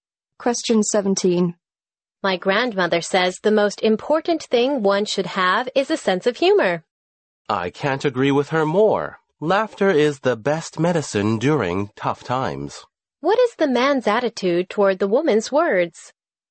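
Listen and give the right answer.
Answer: He agrees completely.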